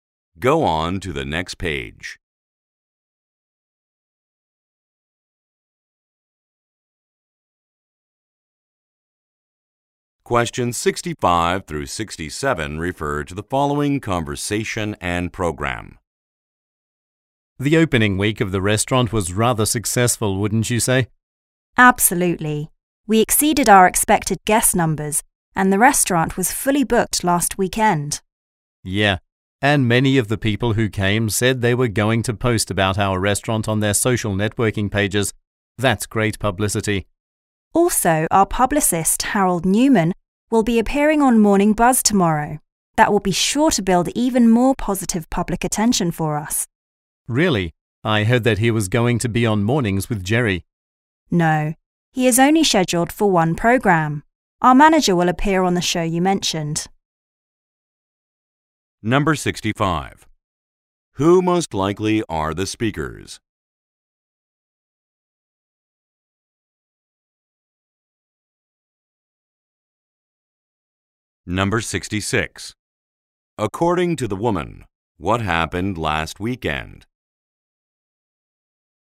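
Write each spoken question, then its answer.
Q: Who most likely are the speakers?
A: Restaurant staff

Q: According to the woman, what happened last weekend?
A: The restaurant was fully booked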